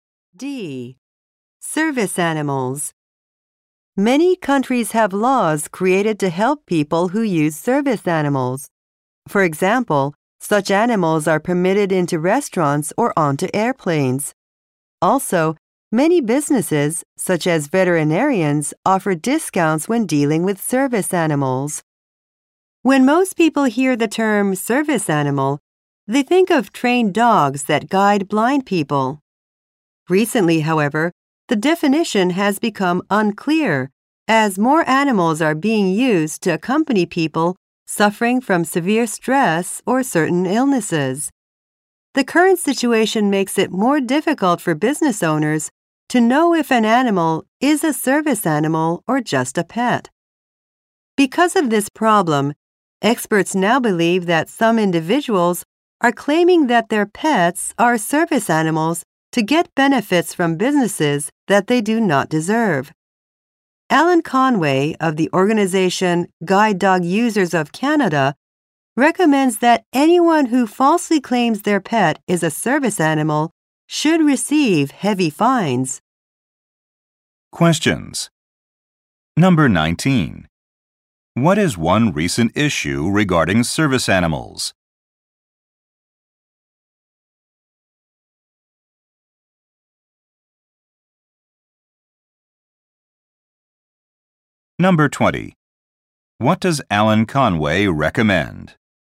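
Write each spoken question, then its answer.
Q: What is one recent issue regarding service animals?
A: Some people falsely claim their pets are service animals to get benefits.

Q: What does Alan Conway recommend?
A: Heavy fines for people who falsely claim their pet is a service animal.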